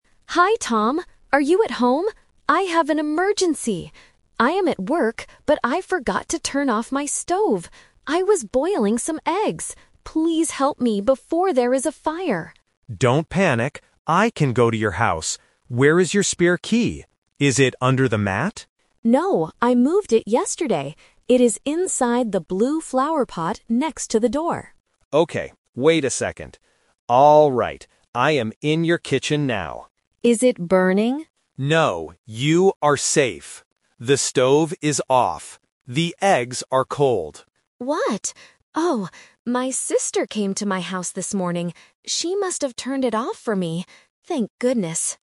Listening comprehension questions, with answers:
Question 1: Why is Sarah calling Tom?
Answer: Because she forgot to turn off her stove.

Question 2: Where is the spare key?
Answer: Inside the blue flower pot.

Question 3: What does Tom find when he goes into the kitchen?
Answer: The stove is already off.

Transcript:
Sarah: Hi Tom. Are you at home? I have an emergency! I am at work, but I forgot to turn off my stove. I was boiling some eggs! Please help me before there is a fire.
Tom: Don't panic. I can go to your house. Where is your spare key? Is it under the mat?
Sarah: No, I moved it yesterday. It is inside the blue flower pot next to the door.
Tom: Okay, wait a second. ... Alright, I am in your kitchen now.
Sarah: Is it burning?
Tom: No, you are safe. The stove is off. The eggs are cold.
Sarah: What? Oh, my sister came to my house this morning. She must have turned it off for me. Thank goodness!